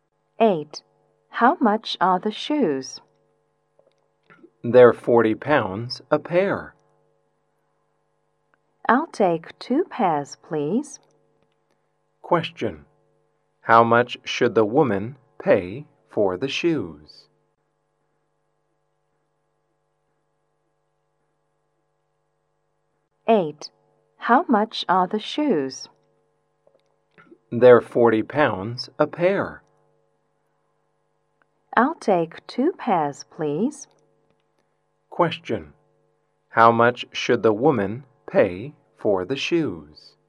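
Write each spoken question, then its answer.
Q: How much should the woman pay for the shoes?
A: 80 pounds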